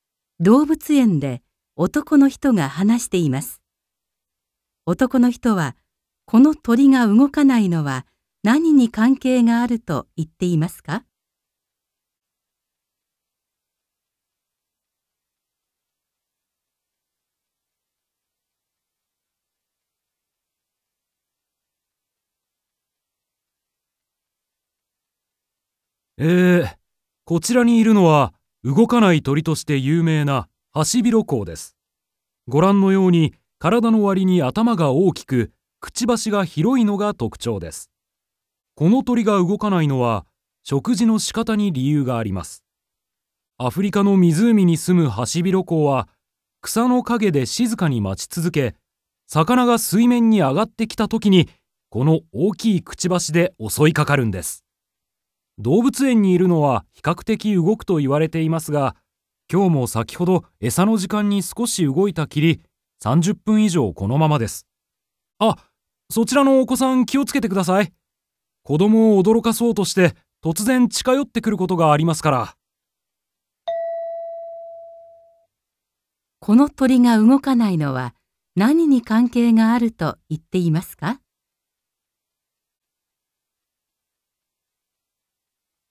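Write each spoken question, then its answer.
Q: この鳥が動かないのは何に関係があると言っていますか?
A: 食事の仕方(魚を待って捕ること)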